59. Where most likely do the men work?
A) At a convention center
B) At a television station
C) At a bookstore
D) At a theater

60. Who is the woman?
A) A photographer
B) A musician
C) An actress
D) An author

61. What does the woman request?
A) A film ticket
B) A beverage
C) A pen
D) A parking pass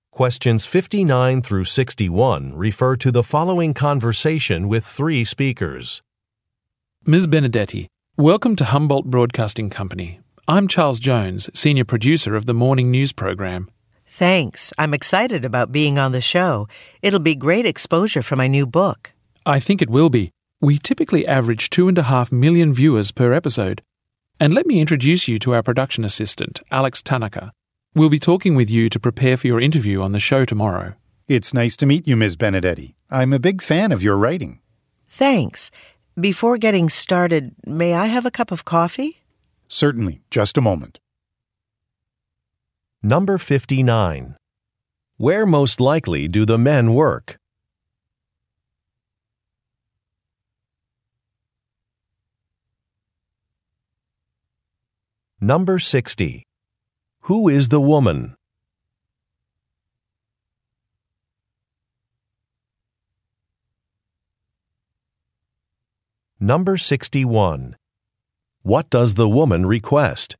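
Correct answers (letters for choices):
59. B
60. D
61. B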